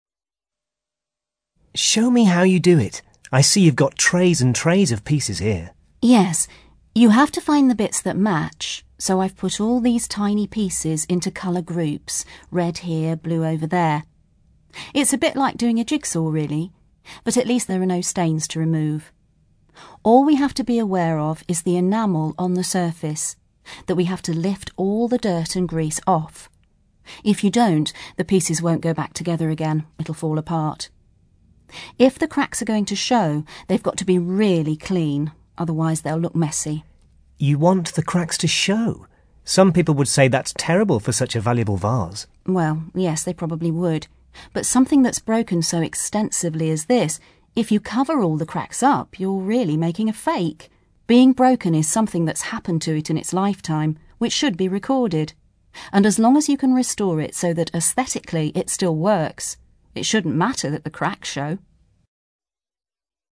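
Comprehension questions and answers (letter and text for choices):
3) What is the expert doing at the start of the interview?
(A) Explaining what can ruin a restoration job.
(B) Comparing various methods of restoration she uses.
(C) Describing the difficulties of matching colours during restoration.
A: (A) Explaining what can ruin a restoration job.

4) How does the expert feel about leaving visible cracks in the finished vase?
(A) They should be avoided if at all possible.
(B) They are part of the vase's history and should be seen.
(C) They affect the value of the vase rather than its appearance.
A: (B) They are part of the vase's history and should be seen.

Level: CAE Certificate in Advanced English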